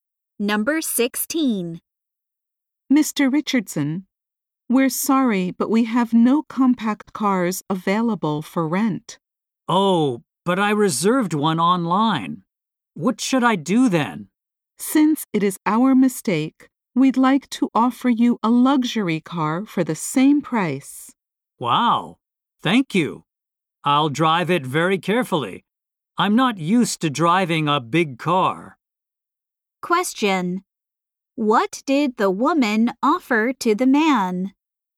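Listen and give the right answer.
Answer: A luxury car for the same price.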